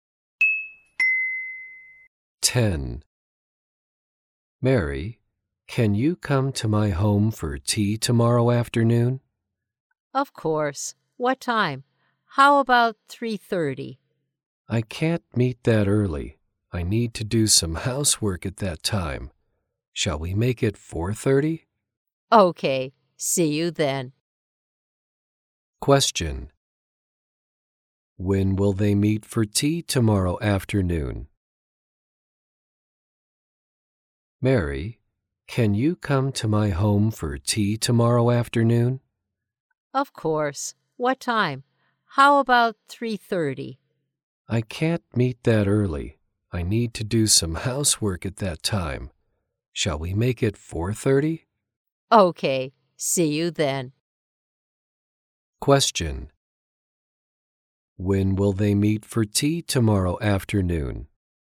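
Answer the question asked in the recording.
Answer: At 4:30.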